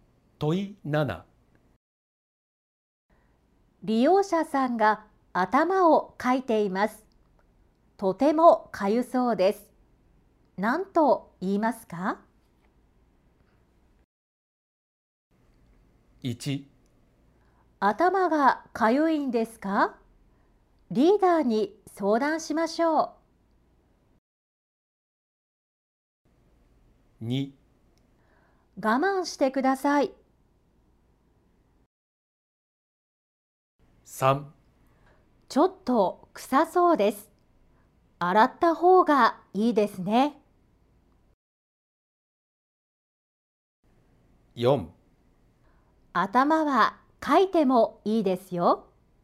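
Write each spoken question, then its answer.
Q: 利用者さんが頭をかいています。とてもかゆそうです。何と言いますか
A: 1: 頭がかゆいんですか?リーダーに相談しましょう。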